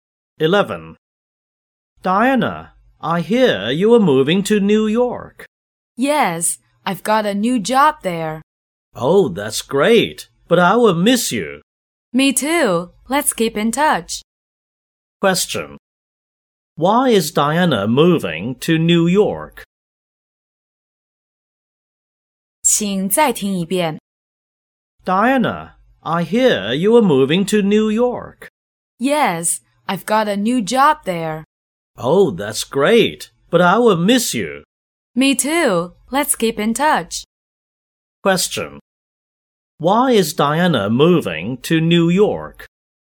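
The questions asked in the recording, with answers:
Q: Why is Diana moving to New York?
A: She has got a new job there.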